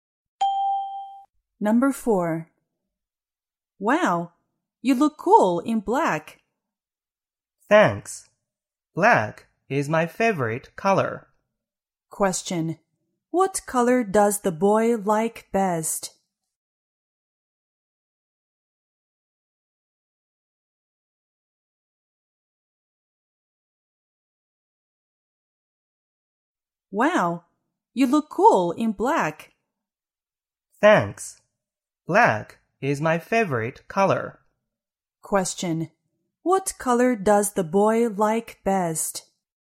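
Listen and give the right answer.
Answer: Black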